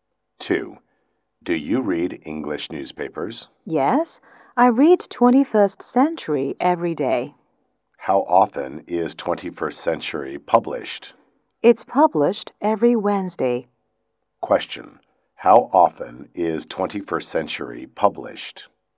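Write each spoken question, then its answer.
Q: How often is 21st Century published?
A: Once a week, every Wednesday.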